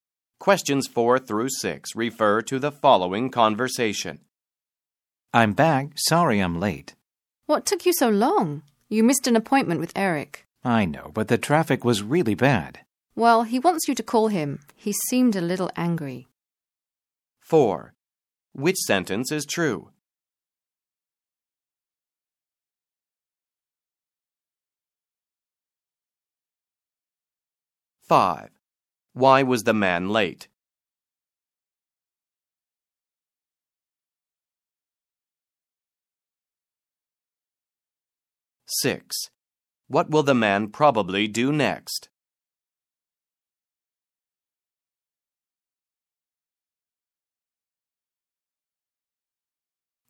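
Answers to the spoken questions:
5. The traffic was really bad
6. Call Eric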